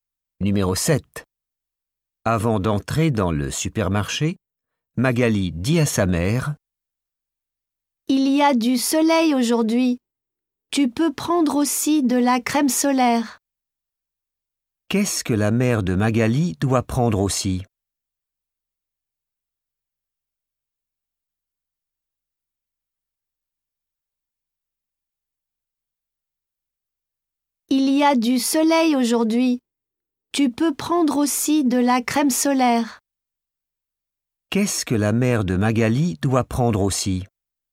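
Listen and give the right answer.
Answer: de la crème solaire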